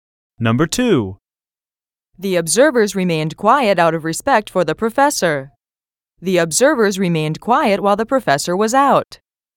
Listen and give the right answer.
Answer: Different is the correct answer.